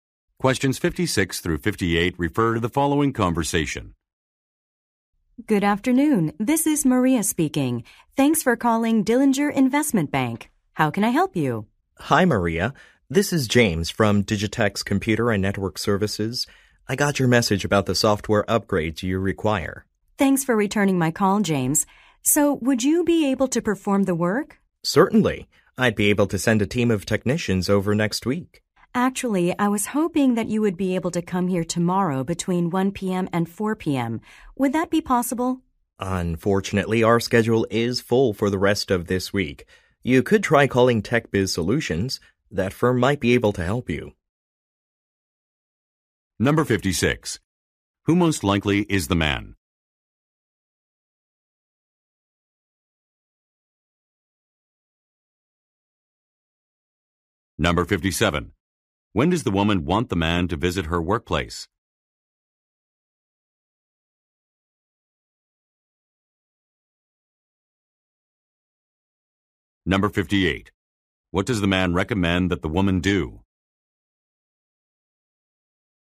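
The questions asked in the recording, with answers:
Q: Who most likely is the man?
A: A computer services worker

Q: When does the woman want the man to visit her workplace?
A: Tomorrow between 1 p.m. and 4 p.m.

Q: What does the man recommend that the woman do?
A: Call TechBiz Solutions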